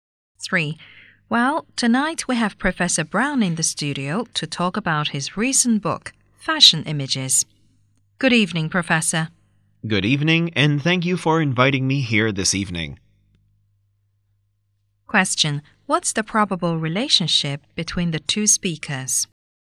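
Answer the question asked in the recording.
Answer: Host and guest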